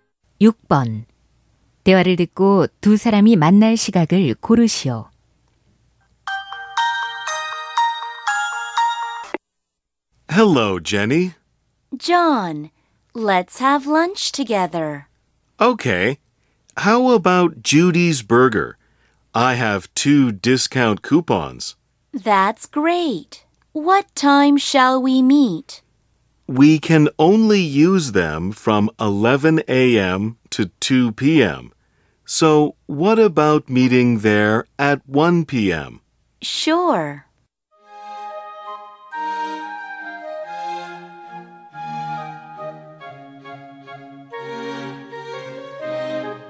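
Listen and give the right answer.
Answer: 오후 1시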